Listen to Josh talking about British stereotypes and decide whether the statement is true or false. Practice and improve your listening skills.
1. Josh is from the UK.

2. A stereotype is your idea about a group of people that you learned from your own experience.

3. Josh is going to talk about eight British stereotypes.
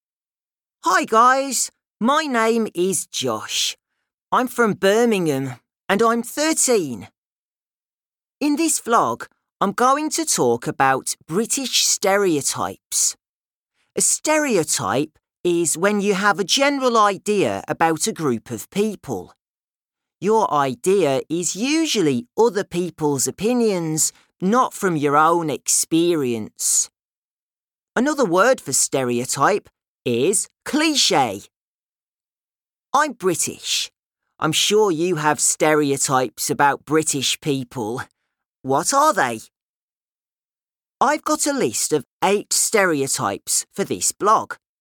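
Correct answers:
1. True
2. False
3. True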